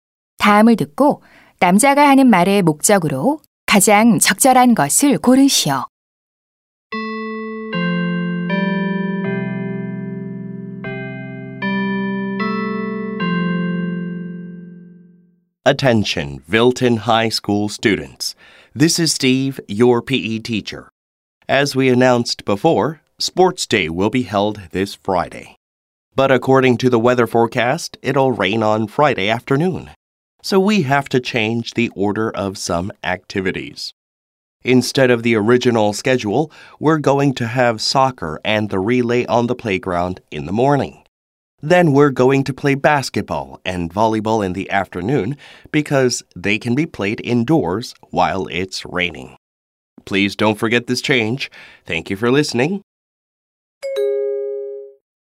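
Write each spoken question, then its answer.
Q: 다음을 듣고 남자가 하는 말의 목적으로 가장 적절한 것을 고르시오.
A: 체육대회 활동 순서 변경을 알리려고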